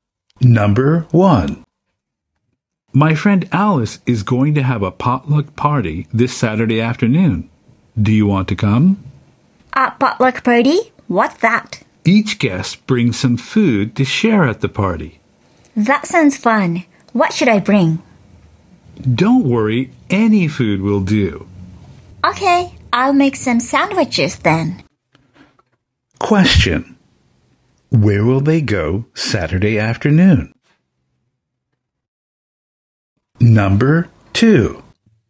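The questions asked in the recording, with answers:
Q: Where will they go Saturday afternoon?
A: To Alice's potluck party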